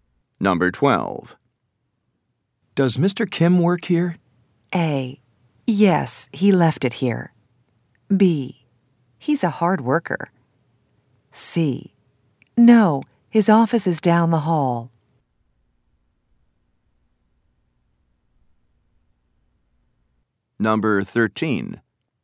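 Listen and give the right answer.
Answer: C: No, his office is down the hall.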